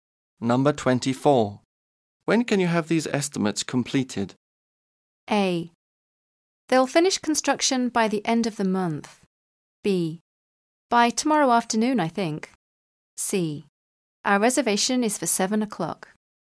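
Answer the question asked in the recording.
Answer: B: By tomorrow afternoon, I think.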